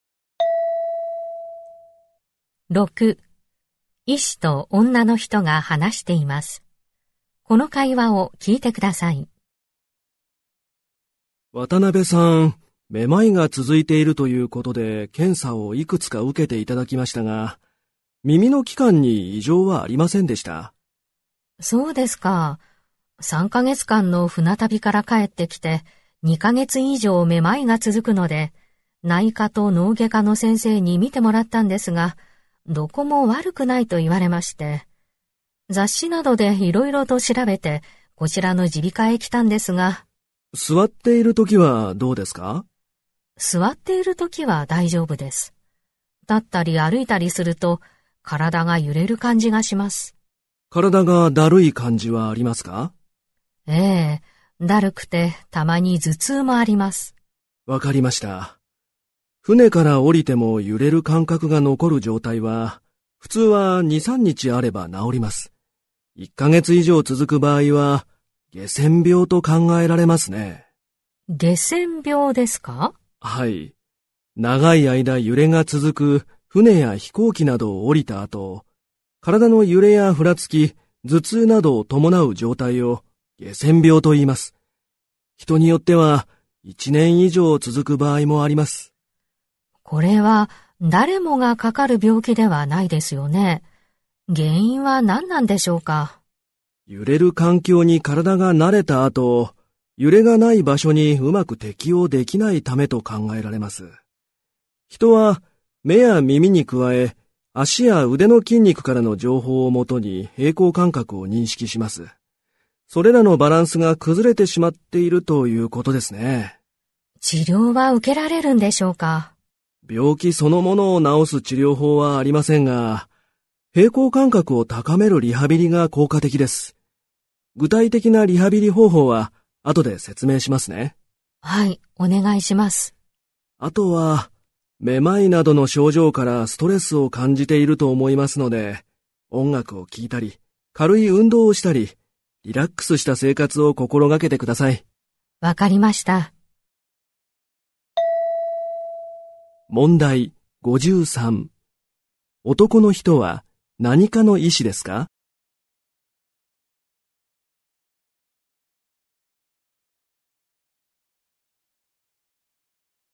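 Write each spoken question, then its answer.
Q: 男の人は何科の医師ですか?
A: 耳鼻科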